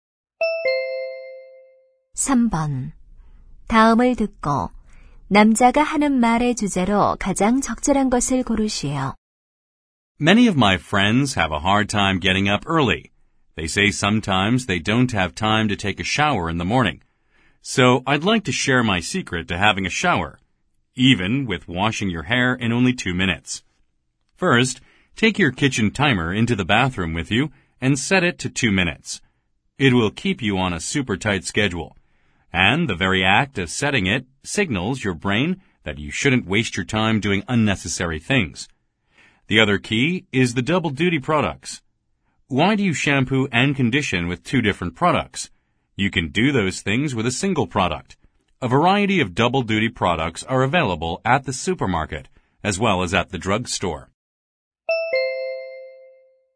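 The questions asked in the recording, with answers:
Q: 다음을 듣고 남자가 하는 말의 주제로 가장 적절한 것을 고르시오.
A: 2분 만에 샤워하는 방법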